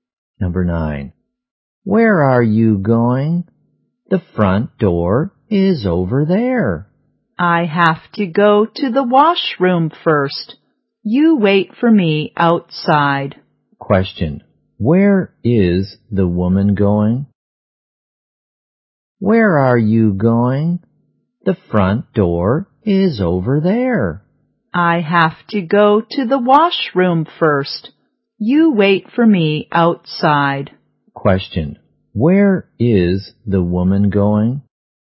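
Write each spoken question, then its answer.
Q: Where is the woman going?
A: To the washroom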